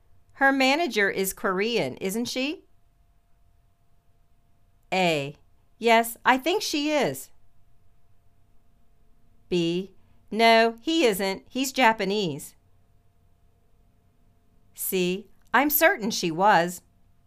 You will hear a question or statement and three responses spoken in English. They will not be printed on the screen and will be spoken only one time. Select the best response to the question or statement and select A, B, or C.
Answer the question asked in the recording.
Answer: Yes, I think she is.